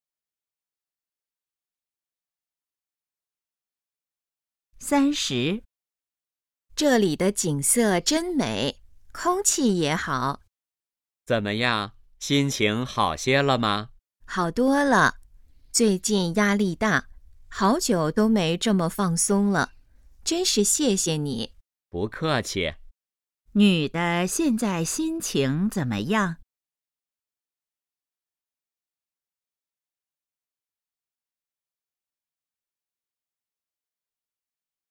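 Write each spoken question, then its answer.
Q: 女的现在心情怎么样?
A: 好多了,很放松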